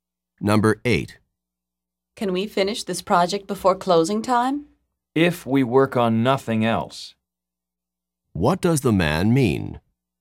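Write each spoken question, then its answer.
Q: What does the man mean?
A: They can finish only if they work on nothing but this project.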